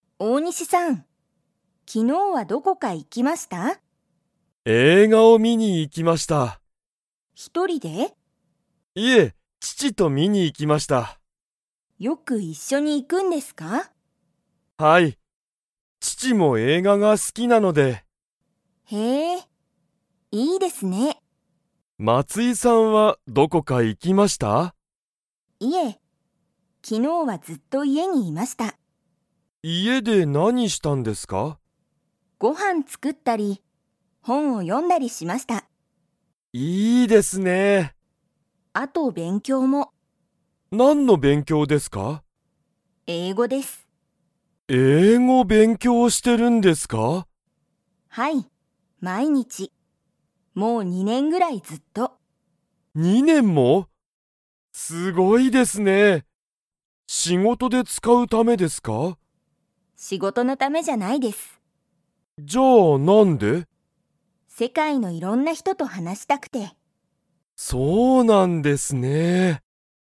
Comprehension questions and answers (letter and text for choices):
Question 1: 大西おおにしさんは、一人ひとりで映画えいがを観みに行いきましたか?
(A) はい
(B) いいえ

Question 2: 松井まついさんは、____話はなしたい。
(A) 世界せかいのいろんな人ひとと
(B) 毎日まいにちご飯はんを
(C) 父ちちと映画えいがのことを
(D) 仕事しごとで英語えいごを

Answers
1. (B) いいえ
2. (A) 世界せかいのいろんな人ひとと

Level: Level 2